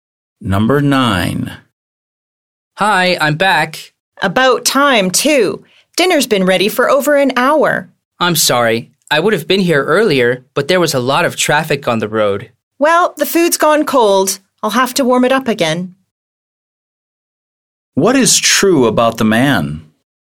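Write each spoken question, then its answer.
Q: What is true about the man?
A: He came home late because of traffic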